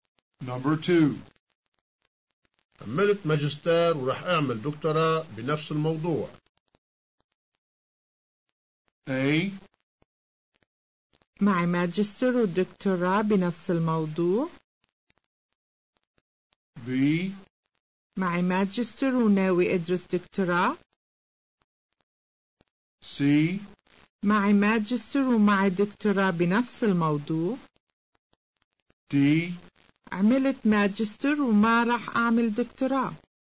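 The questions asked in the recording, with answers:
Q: عملت ماجستير ورح أعمل دكتوراه بنفس الموضوع.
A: B: معي ماجستير وناوي أدرس دكتوراه.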